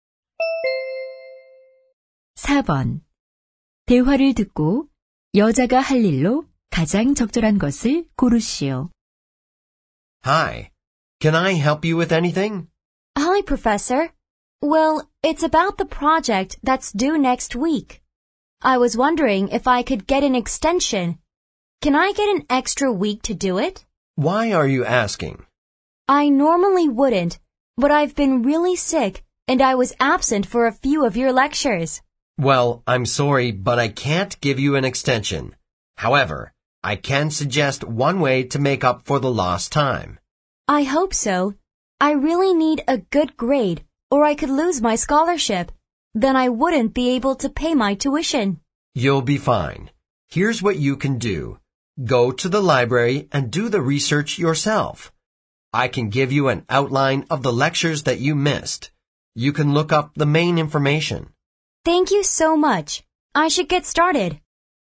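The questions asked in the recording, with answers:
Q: 대화를 듣고 여자가 할 일로 가장 적절한 것을 고르시오.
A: 도서관에 가서 직접 자료 조사하기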